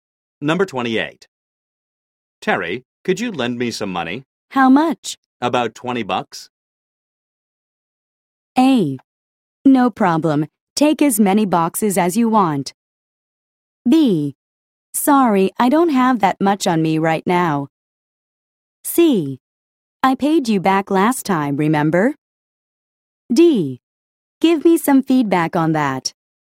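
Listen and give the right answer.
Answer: B: Sorry, I don't have that much on me right now.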